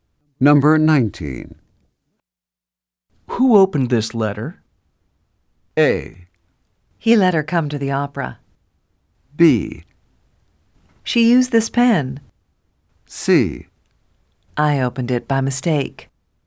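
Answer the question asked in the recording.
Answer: C: I opened it by mistake.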